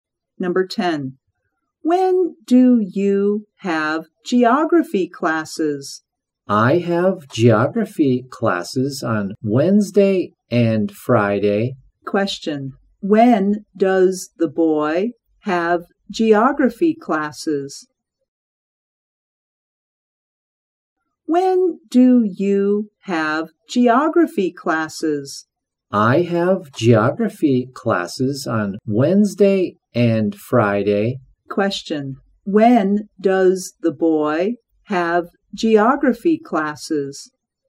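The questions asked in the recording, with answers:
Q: When does the boy have geography classes?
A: On Wednesday and Friday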